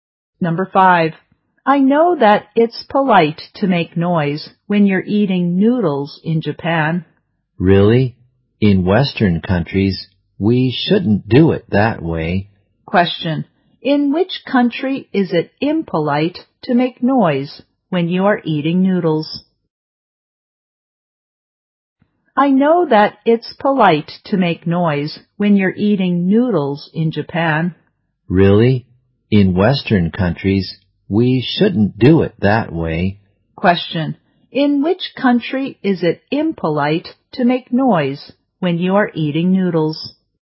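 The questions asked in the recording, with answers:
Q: Question. In which country is it impolite to make noise when you are eating noodles?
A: In Western countries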